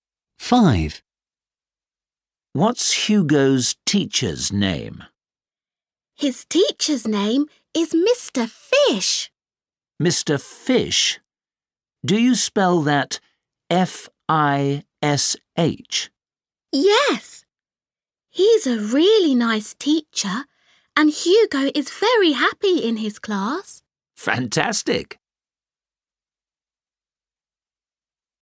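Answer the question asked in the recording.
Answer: Mr. Fish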